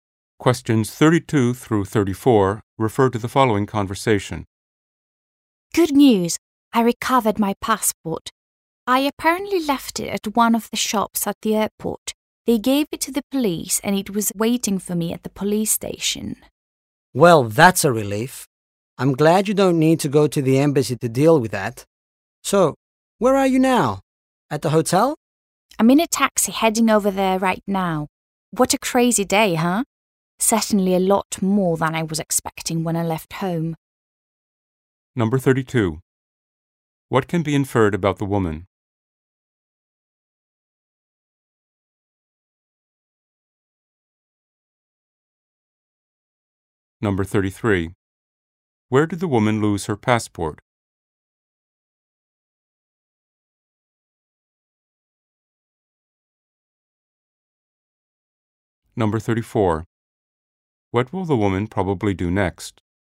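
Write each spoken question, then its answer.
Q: Where did the woman lose her passport?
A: At a shop at the airport

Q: What will the woman probably do next?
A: Go to the hotel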